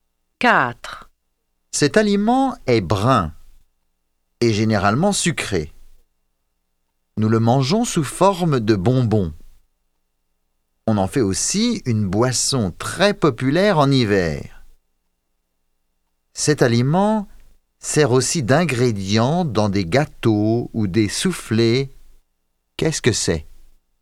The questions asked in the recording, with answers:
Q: Qu'est-ce que c'est?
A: C'est du chocolat.